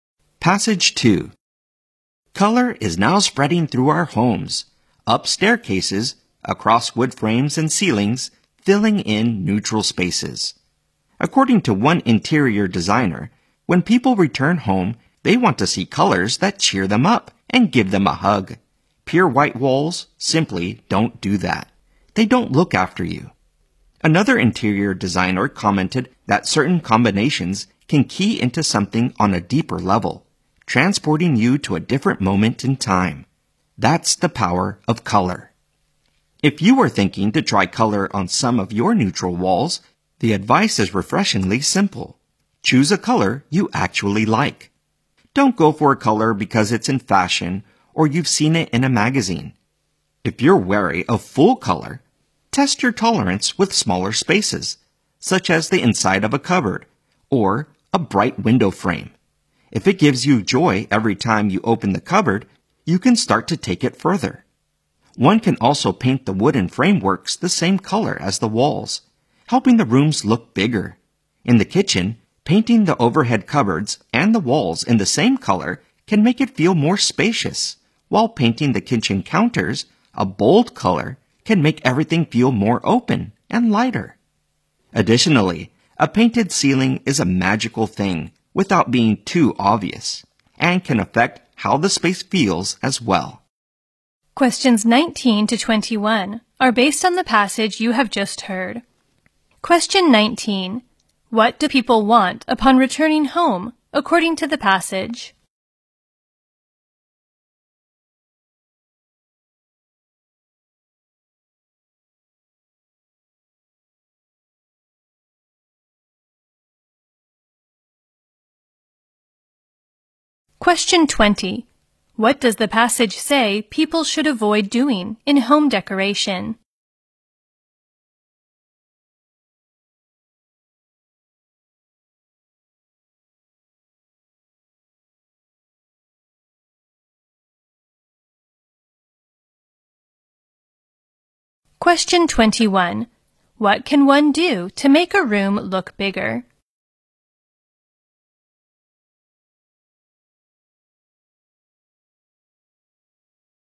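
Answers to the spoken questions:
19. To see colors that cheer them up
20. Choosing a color just because it's in fashion
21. Paint the wooden frameworks the same color as the walls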